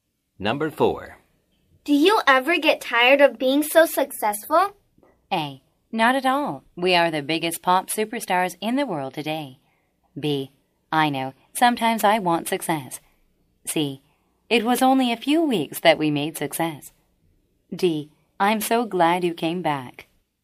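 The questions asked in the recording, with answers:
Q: Do you ever get tired of being so successful?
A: A: Not at all. We are the biggest pop superstars in the world today.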